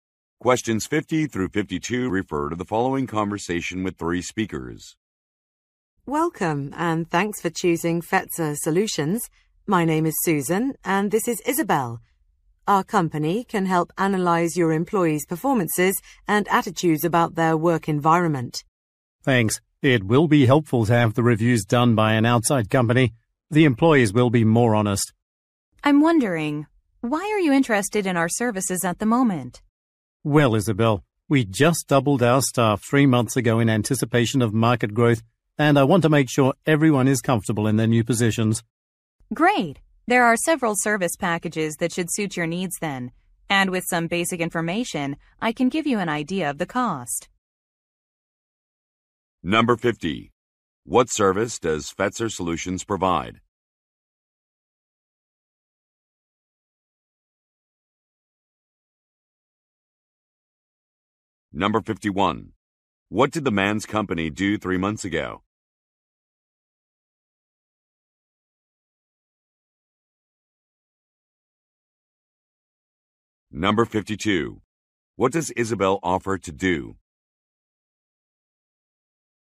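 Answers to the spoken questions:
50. Employee performance and attitude reviews
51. Doubled its staff
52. Give a cost estimate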